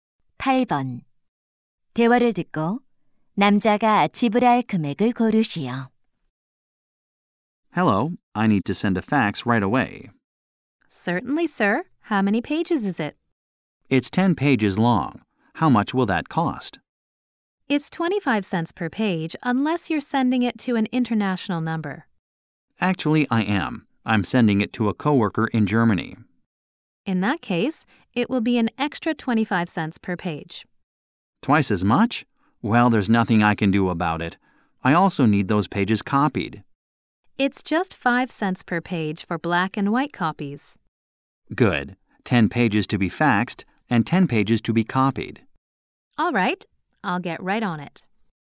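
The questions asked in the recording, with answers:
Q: 대화를 듣고 남자가 지불할 금액을 고르시오.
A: $5.50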